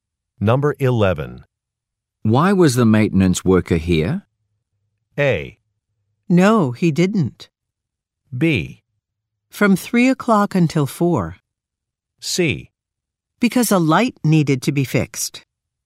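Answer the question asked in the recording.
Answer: C: Because a light needed to be fixed.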